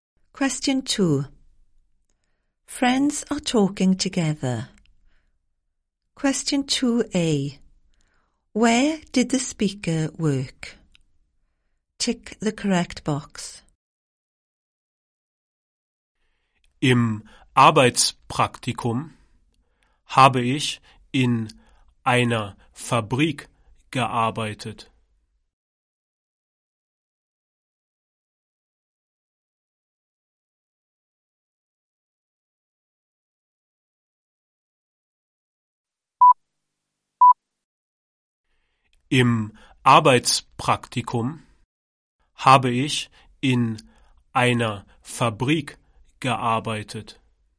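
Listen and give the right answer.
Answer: In a factory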